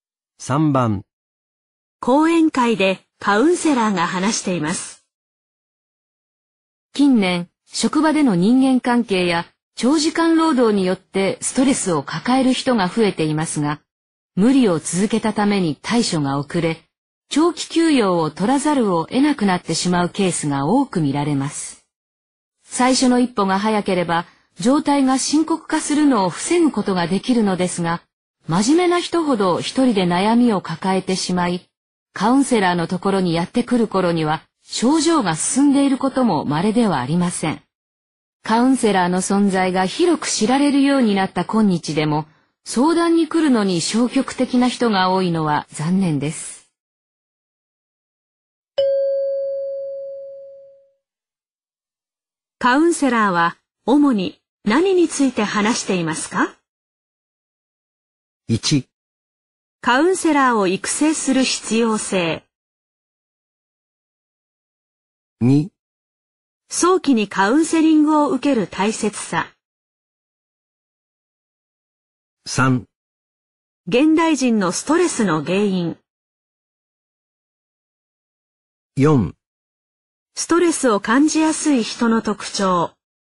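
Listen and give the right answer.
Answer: 2: 早期にカウンセリングを受ける大切さ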